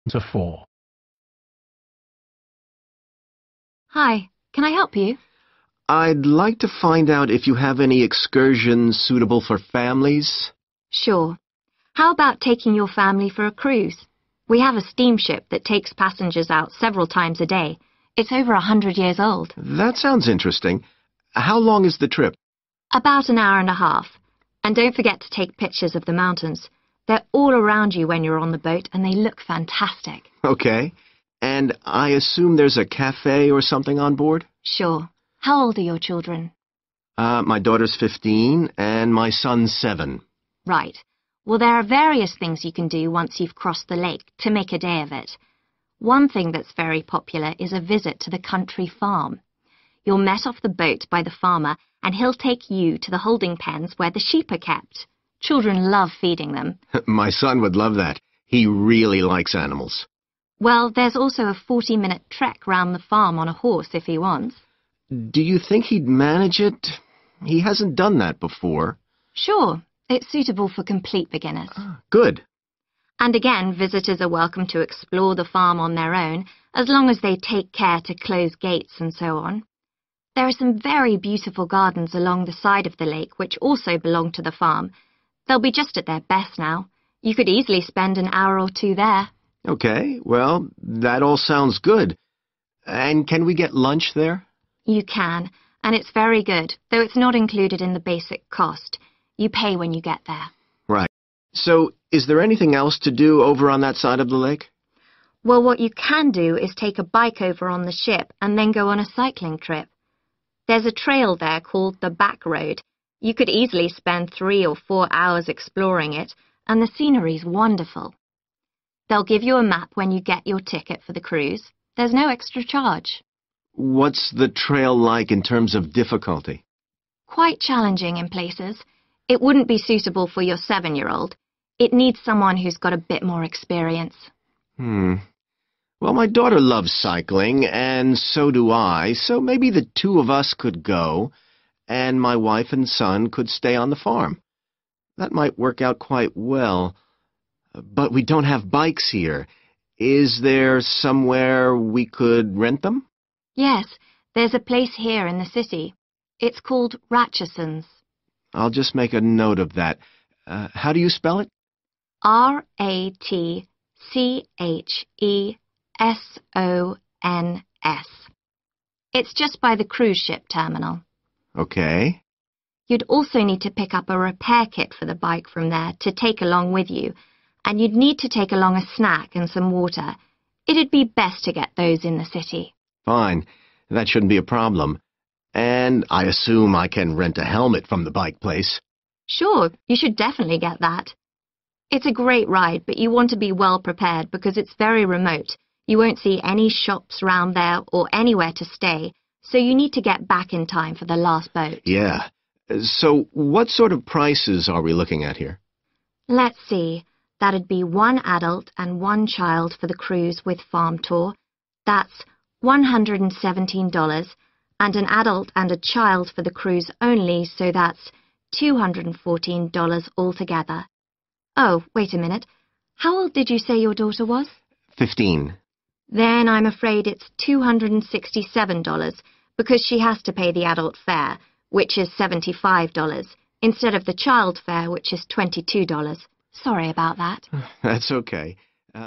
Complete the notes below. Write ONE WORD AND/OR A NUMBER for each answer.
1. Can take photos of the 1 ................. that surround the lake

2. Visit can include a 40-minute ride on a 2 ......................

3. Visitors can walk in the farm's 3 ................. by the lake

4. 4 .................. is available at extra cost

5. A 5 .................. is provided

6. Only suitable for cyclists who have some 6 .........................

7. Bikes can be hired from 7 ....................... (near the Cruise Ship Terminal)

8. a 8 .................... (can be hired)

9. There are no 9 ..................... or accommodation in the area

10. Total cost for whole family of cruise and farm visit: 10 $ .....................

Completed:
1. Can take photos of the mountains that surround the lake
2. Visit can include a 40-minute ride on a horse
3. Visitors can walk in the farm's garden(s) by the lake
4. lunch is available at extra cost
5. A map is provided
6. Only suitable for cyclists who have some experience
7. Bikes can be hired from Ratchesons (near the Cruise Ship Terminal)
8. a helmet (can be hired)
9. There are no shops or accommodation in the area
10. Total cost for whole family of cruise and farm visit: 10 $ 267